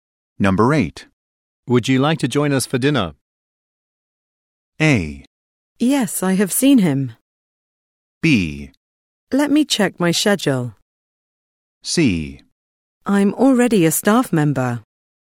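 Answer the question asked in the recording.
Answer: B: Let me check my schedule.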